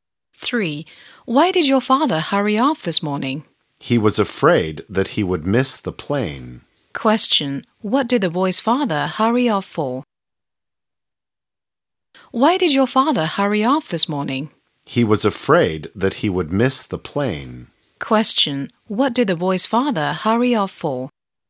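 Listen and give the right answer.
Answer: To catch the plane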